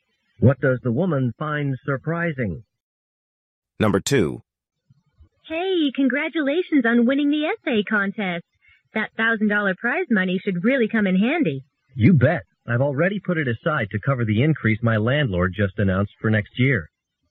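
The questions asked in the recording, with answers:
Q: What does the man mean?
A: He will use the prize money to pay his increased rent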